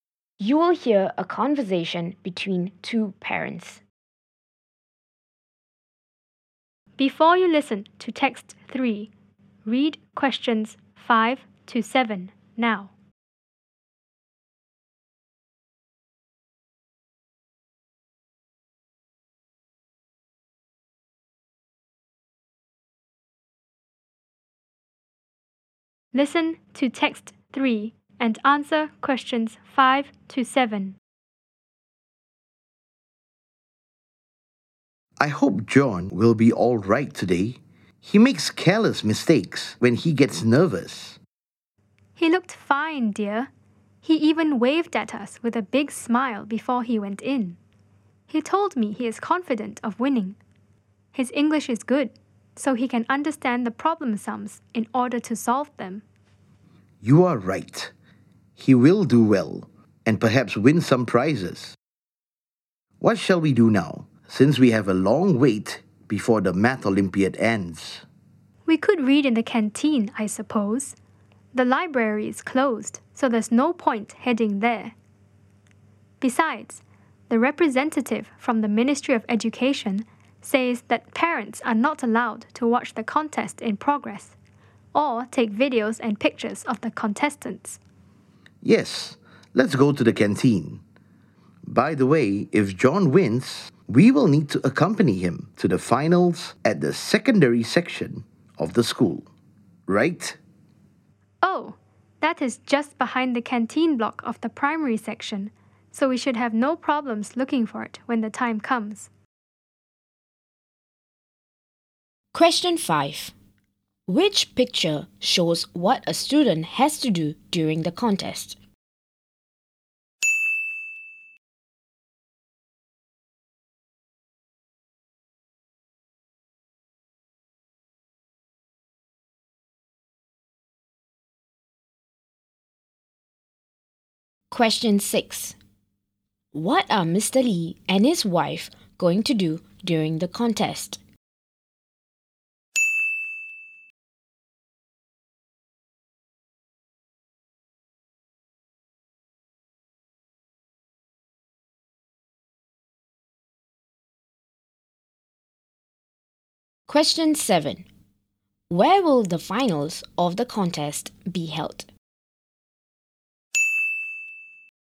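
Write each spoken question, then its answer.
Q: What are Mr. Lee and his wife going to do during the contest?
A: Read in the canteen

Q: Where will the finals of the contest be held?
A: At the secondary section of the school, behind the canteen block of the primary section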